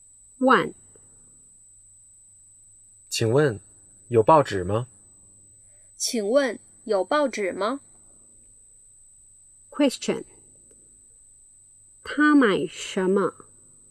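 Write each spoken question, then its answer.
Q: 他买什么?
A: 报纸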